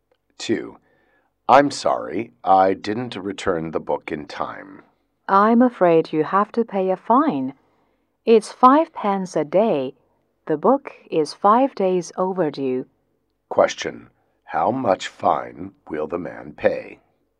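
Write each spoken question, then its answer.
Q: How much fine will the man pay?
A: 25 pence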